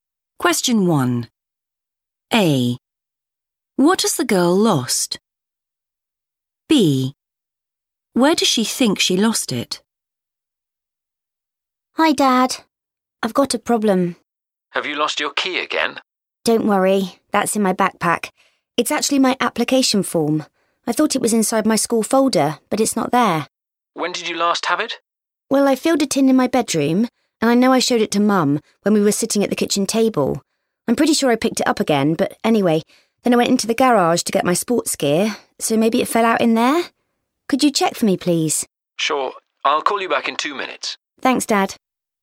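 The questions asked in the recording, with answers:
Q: What has the girl lost?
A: her application form

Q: Where does she think she lost it?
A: in the garage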